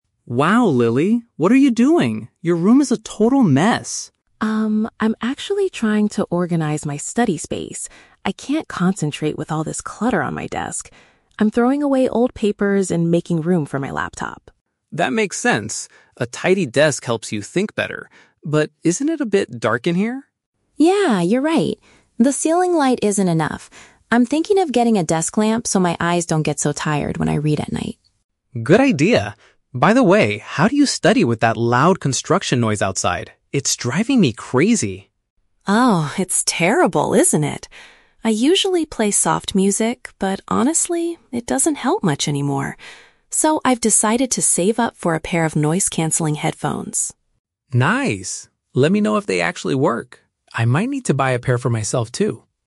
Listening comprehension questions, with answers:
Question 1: Why is Lily clearing off her desk?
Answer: To create a neat area that helps her focus better.

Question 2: Why does Lily want to get a desk lamp?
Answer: To prevent her eyes from hurting during evening study sessions.

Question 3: How has Lily decided to handle the annoying sounds from outside?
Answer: She plans to purchase a special type of audio headset.

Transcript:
Tom: Wow, Lily. What are you doing? Your room is a total mess!
Lily: Um, I'm actually trying to organize my study space. I can't concentrate with all this clutter on my desk. I'm throwing away old papers and making room for my laptop.
Tom: That makes sense. A tidy desk helps you think better. But isn't it a bit dark in here?
Lily: Yeah, you're right. The ceiling light isn't enough. I'm thinking of getting a desk lamp so my eyes don't get so tired when I read at night.
Tom: Good idea. By the way, how do you study with that loud construction noise outside? It's driving me crazy.
Lily: Oh, it's terrible, isn't it? I usually play soft music, but honestly, it doesn't help much anymore. So, I've decided to save up for a pair of noise-cancelling headphones.
Tom: Nice! Let me know if they actually work. I might need to buy a pair for myself too.